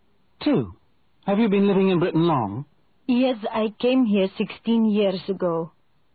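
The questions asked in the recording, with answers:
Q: Have you been living in Britain long?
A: 16 years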